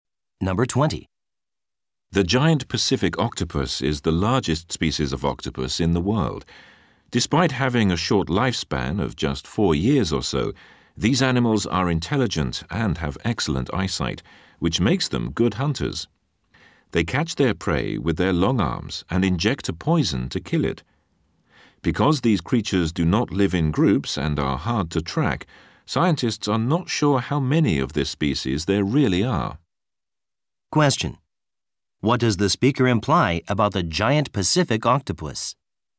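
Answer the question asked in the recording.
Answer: Its population size is unknown because it lives alone and is hard to track.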